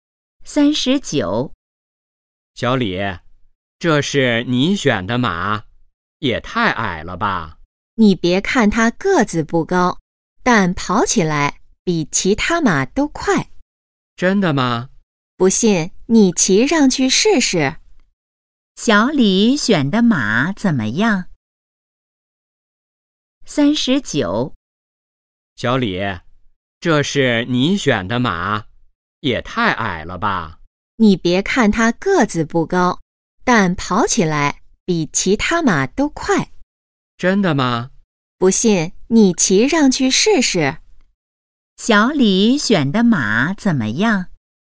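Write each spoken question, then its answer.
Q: 小李选的马怎么样?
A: 个子不高,但跑得比其他马快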